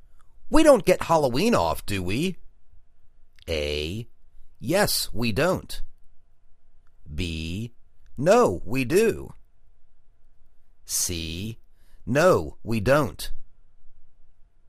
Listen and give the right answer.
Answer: No, we don't.